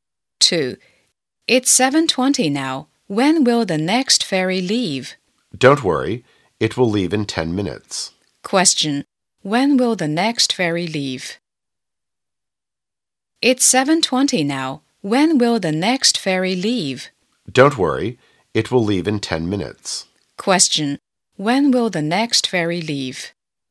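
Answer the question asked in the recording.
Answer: At 7:30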